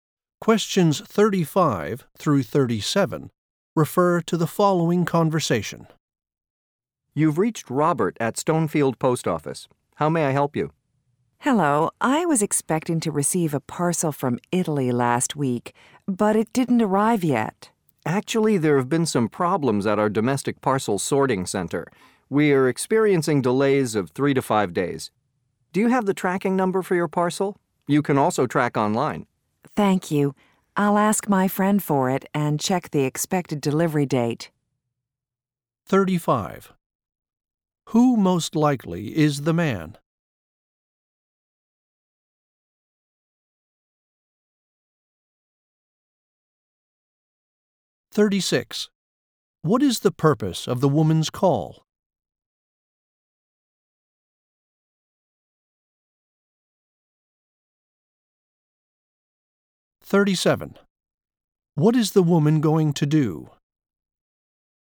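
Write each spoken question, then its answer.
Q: Who most likely is the man?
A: A post office employee

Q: What is the purpose of the woman's call?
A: To ask about a parcel from Italy that has not arrived

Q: What is the woman going to do?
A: Ask her friend for the tracking number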